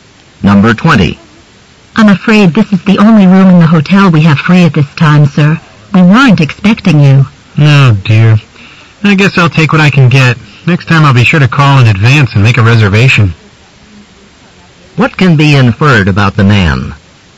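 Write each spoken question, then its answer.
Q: What can be inferred about the man?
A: He didn't make a reservation.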